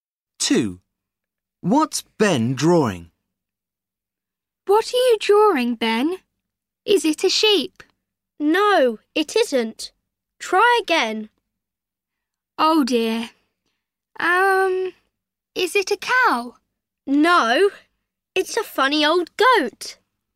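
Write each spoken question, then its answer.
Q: What's Ben drawing?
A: a goat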